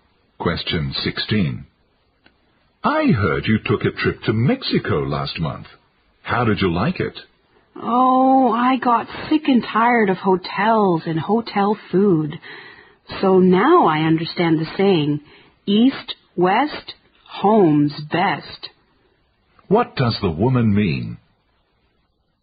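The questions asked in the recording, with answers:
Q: What does the woman mean?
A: She didn't enjoy the trip and would rather be at home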